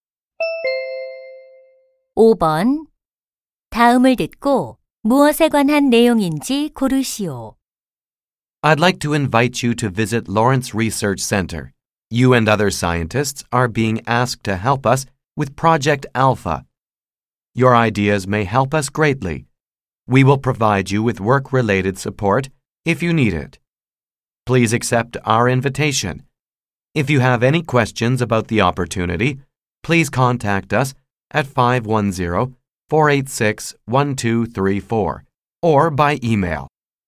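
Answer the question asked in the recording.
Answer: 연구소 방문 및 프로젝트 참여 초청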